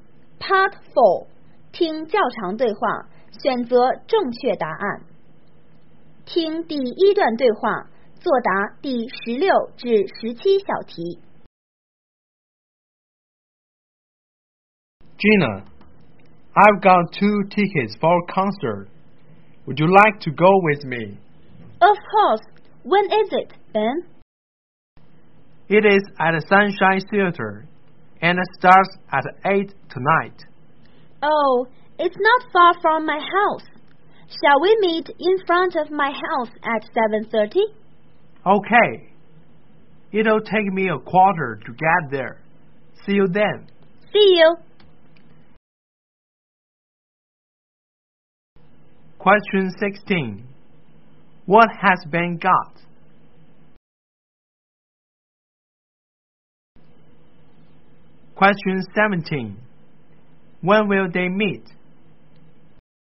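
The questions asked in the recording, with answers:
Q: Question 16. What has Ben got?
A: Two concert tickets

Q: Question 17. When will they meet?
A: At 7:30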